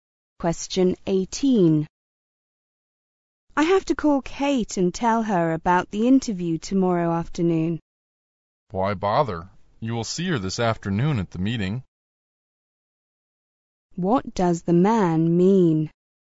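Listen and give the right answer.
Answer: There is no need to call Kate; she can tell her at the meeting this afternoon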